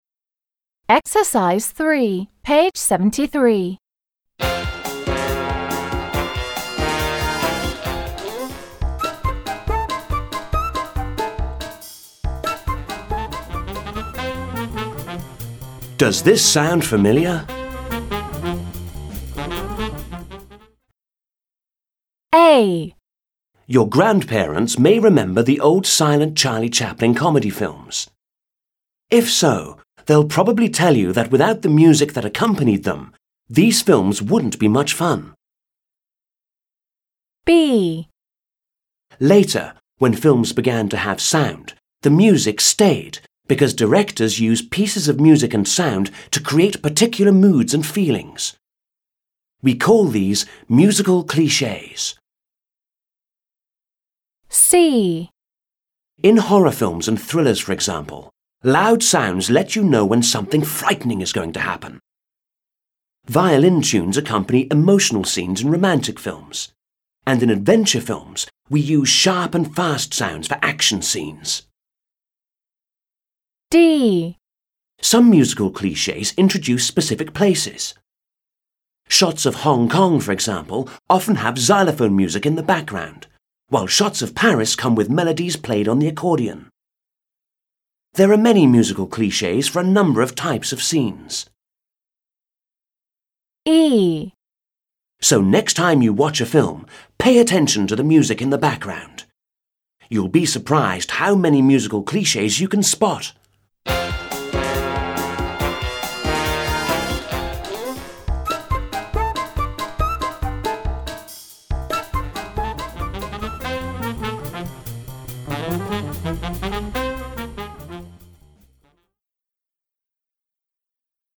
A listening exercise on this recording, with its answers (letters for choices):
3. Match the headings to the paragraphs. Listen and check. Which words helped you decide? Explain the words in bold.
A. Listen out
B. Stereotypical music sounds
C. Before sound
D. Music around the world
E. Musical cliches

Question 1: Paragraph A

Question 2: Paragraph B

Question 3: Paragraph C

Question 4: Paragraph D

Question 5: Paragraph E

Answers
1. C
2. E
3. B
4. D
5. A

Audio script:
A. Your grandparents may remember the old silent Charlie Chaplin comedy films. If so, they'll probably tell you that without the music that accompanied them these films wouldn't be much fun.
B. Later, when films began to have sound, the music stayed because directors use pieces of music and sound to create particular moods and feelings. We call these musical clichés.
C. In horror films and thrillers, for example, loud sounds let you know when something frightening is going to happen. Violin tunes accompany emotional scenes in romantic films, and in adventure films we use sharp and fast sounds for action scenes.
D. Some musical clichés introduce specific places. Shots of Hong Kong, for example, often have xylophone music in the background while shots of Paris come with melodies played on the accordion. There are many musical clichés for a number of types of scenes.
E. So, next time you watch a film, pay attention to the music in the background. You'll be surprised how many musical clichés you can spot.

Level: 7 класс